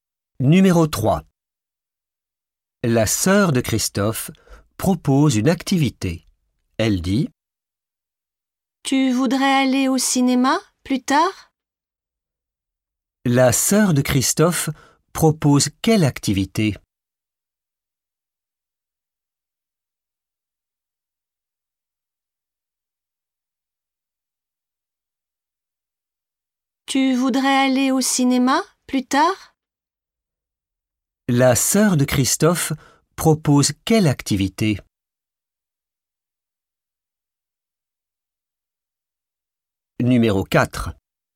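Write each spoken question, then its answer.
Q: La sœur de Christophe propose quelle activité?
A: aller au cinéma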